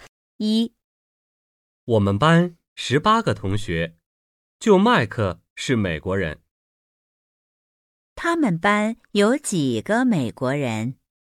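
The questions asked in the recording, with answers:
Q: 他们班有几个美国人?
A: 一个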